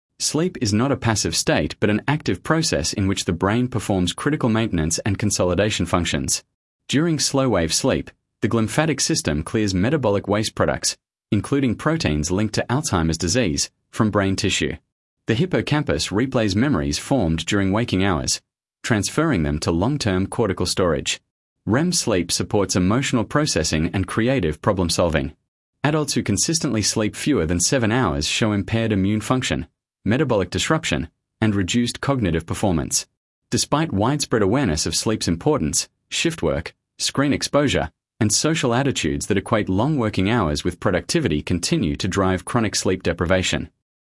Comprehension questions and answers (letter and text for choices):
Task reminder: Read all options before the audio starts. Select the paragraph that best summarises the recording. The correct answer matches the main idea and tone, not just one detail.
Sample Text 1 — The Psychology of Sleep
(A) A. Modern lifestyles cause sleep deprivation, which impairs memory, physical health, and emotional regulation, yet sleep continues to be undervalued.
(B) B. The primary function of sleep is to rest the body, and the brain remains largely inactive during this period.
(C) C. Sleep research shows that most people need only five hours per night to maintain optimal performance.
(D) D. Artificial lighting has improved productivity by extending the hours available for work, outweighing the costs of reduced sleep.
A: (A) A. Modern lifestyles cause sleep deprivation, which impairs memory, physical health, and emotional regulation, yet sleep continues to be undervalued.